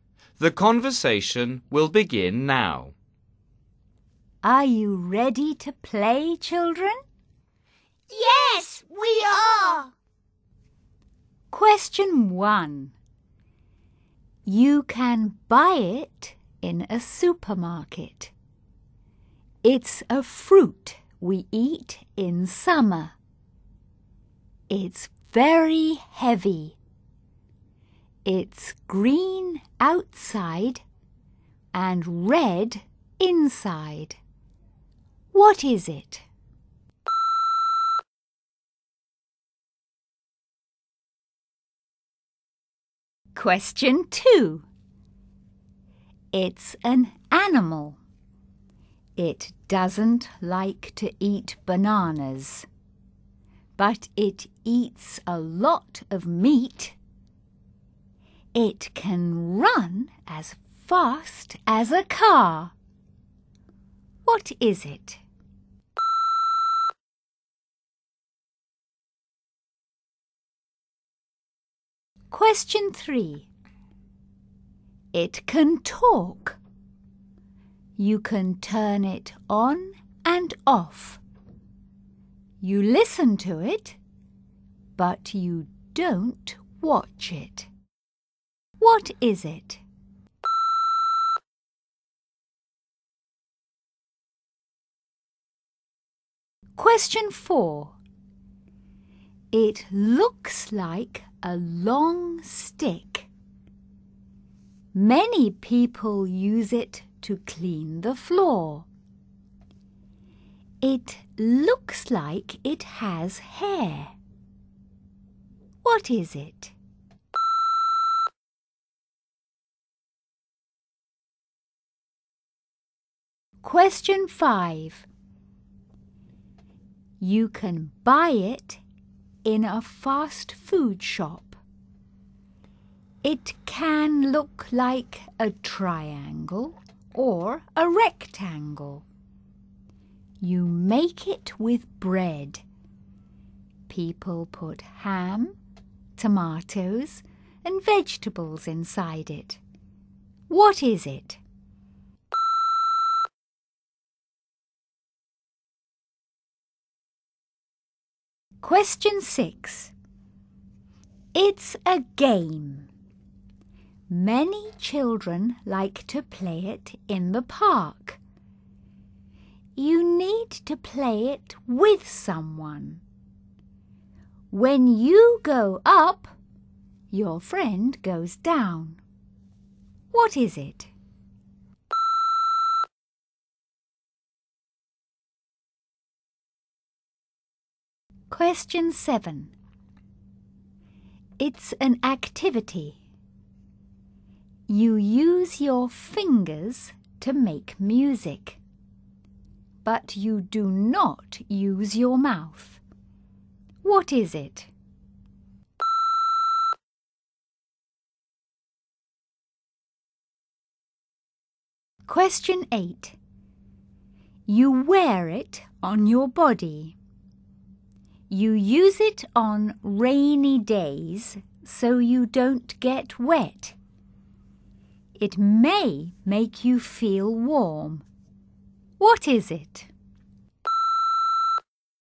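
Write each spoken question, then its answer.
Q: What is it?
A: a watermelon

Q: What is it?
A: a radio

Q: What is it?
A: a mop

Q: What is it?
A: a sandwich

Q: What is it?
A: seesaw

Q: What is it?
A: a raincoat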